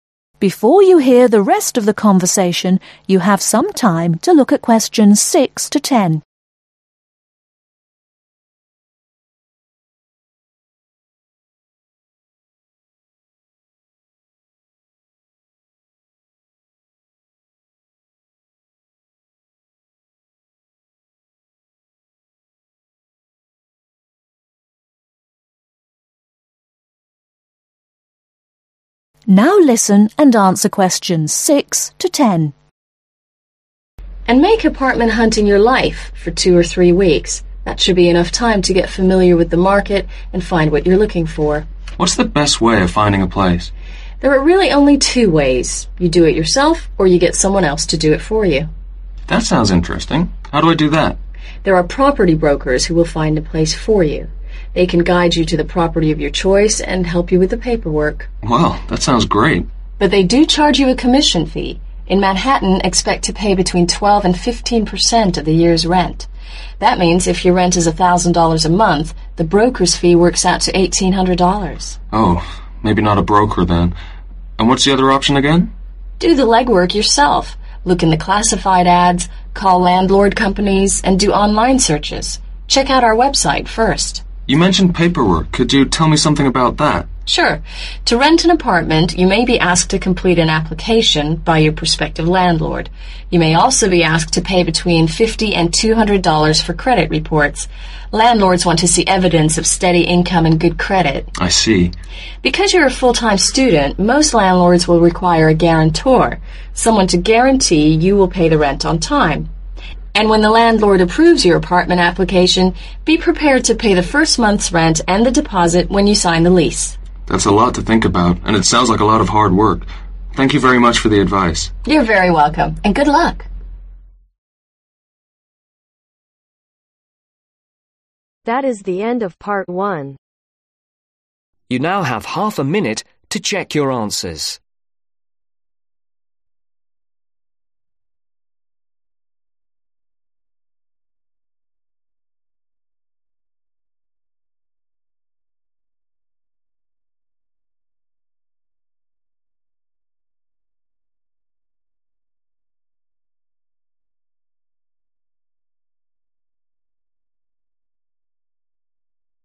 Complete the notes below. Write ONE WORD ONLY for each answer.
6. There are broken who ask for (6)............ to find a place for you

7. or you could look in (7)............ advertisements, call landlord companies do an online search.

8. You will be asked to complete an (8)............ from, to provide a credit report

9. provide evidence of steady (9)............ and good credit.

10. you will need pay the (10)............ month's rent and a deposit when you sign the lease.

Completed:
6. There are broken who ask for commission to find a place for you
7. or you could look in classified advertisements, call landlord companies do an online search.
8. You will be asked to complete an application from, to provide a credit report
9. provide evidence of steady income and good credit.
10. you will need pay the first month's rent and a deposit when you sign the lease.